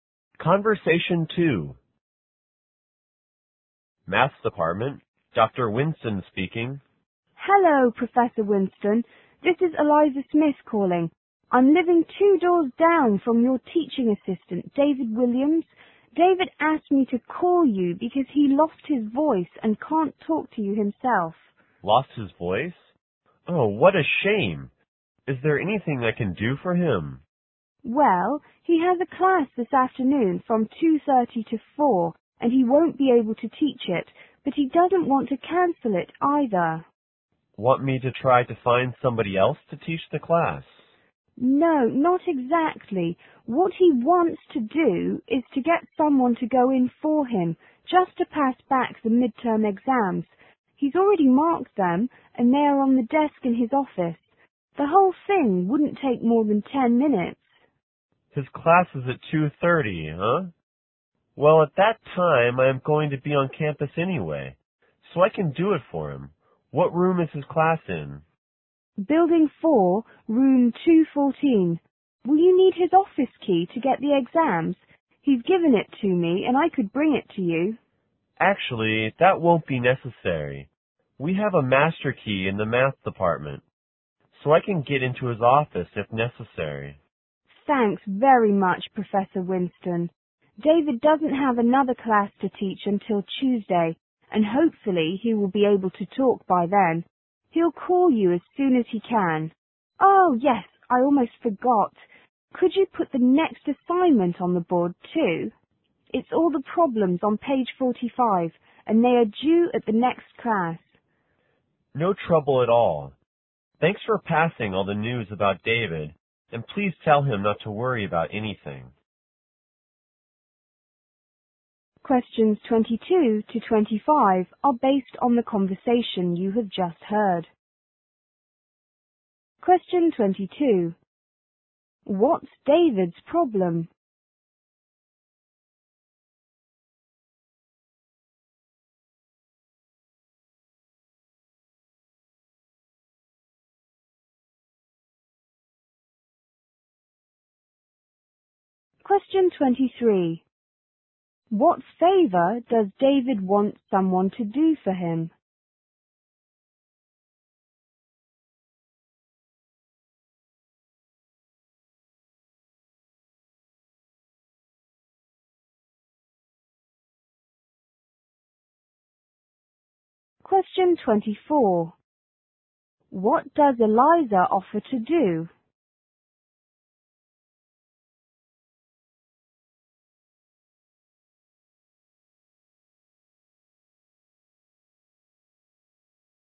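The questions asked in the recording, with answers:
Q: What's David's problem?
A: He has lost his voice

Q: What favor does David want someone to do for him?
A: Pass back the midterm exams in his class

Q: What does Eliza offer to do?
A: Bring David's office key to the professor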